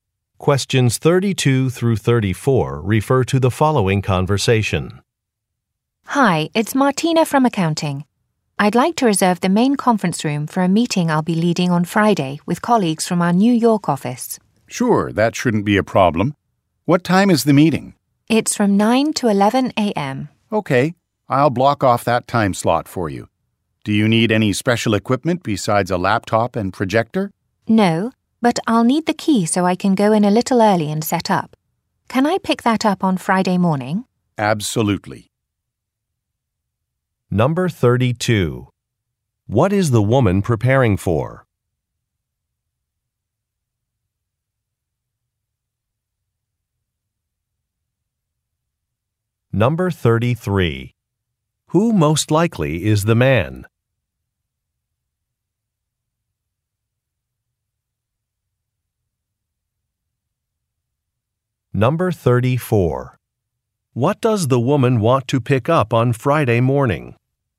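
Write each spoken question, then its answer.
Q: What is the woman preparing for?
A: A meeting with colleagues from the New York office

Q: What does the woman want to pick up on Friday morning?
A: A key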